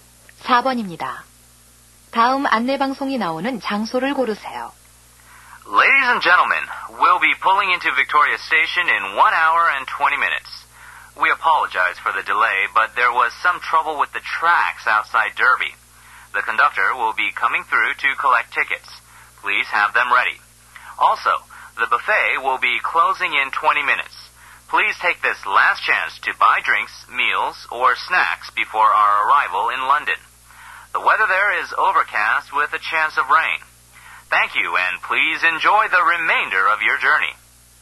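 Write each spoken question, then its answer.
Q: 다음 안내방송이 나오는 장소를 고르세요.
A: 기차 안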